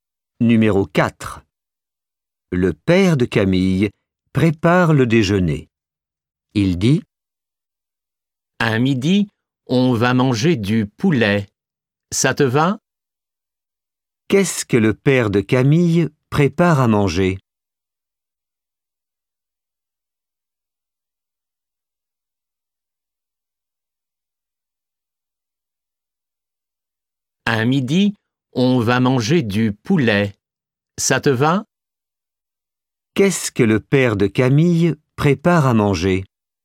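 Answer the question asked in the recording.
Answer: Du poulet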